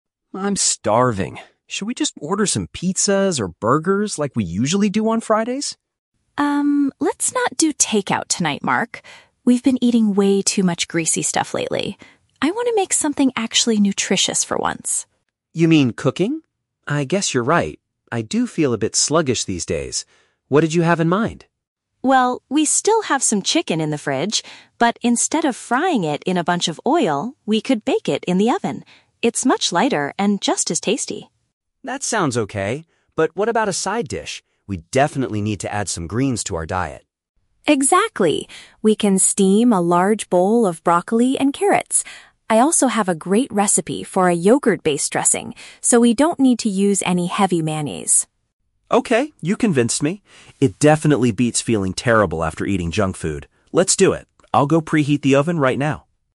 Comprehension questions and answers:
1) Why does Sophie reject Mark's initial suggestion for dinner?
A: She believes they have consumed too much unhealthy food recently.

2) How do they decide to prepare the chicken?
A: By heating it inside the cooker for a lighter meal.

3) What kind of sauce will Sophie prepare for the vegetables?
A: A healthier alternative made from dairy.

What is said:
Mark: I'm starving. Should we just order some pizzas or burgers like we usually do on Fridays?
Sophie: Um, let's not do takeout tonight, Mark. We've been eating way too much greasy stuff lately. I want to make something actually nutritious for once.
Mark: You mean cooking? I guess you're right. I do feel a bit sluggish these days. What did you have in mind?
Sophie: Well, we still have some chicken in the fridge. But instead of frying it in a bunch of oil, we could bake it in the oven. It's much lighter and just as tasty.
Mark: That sounds okay. But what about a side dish? We definitely need to add some greens to our diet.
Sophie: Exactly. We can steam a large bowl of broccoli and carrots. I also have a great recipe for a yogurt-based dressing, so we don't need to use any heavy mayonnaise.
Mark: Okay, you convinced me. It definitely beats feeling terrible after eating junk food. Let's do it. I'll go preheat the oven right now.